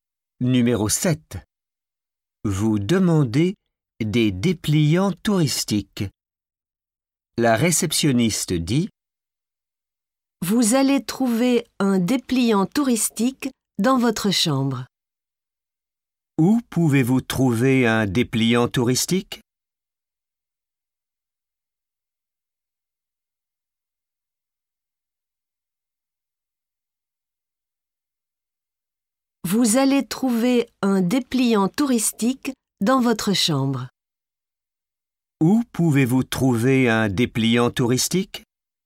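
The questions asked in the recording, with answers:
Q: Où pouvez-vous trouver un dépliant touristique ?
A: Dans votre chambre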